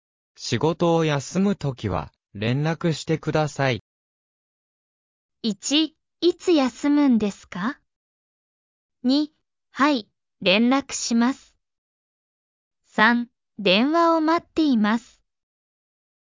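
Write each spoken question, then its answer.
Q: 仕事を休むときは、連絡してください。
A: 2: はい、連絡します。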